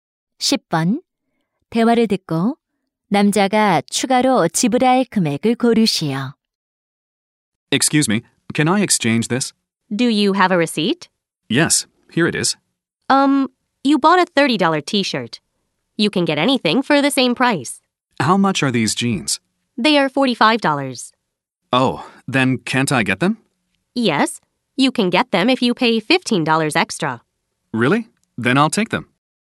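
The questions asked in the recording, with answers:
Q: 대화를 듣고 남자가 추가로 지불할 금액을 고르시오.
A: 15달러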